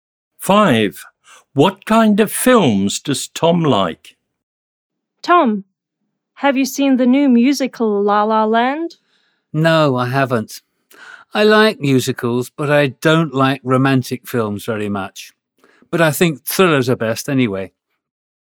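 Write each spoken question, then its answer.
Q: What kind of films does Tom like?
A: Thrillers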